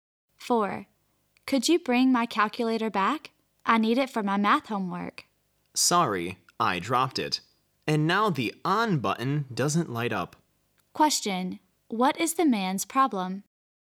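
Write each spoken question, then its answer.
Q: What is the man's problem?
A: He broke the woman's calculator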